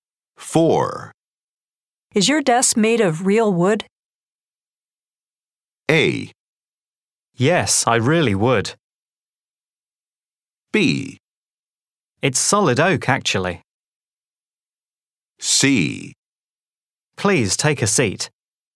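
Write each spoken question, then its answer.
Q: Is your desk made of real wood?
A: B: It's solid oak, actually.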